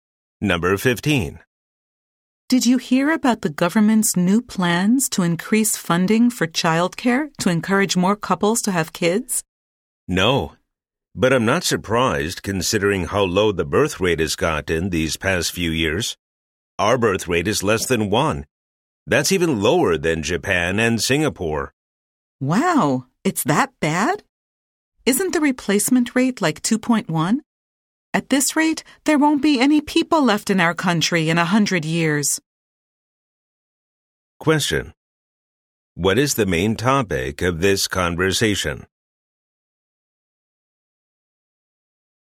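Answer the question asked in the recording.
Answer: The country's low birth rate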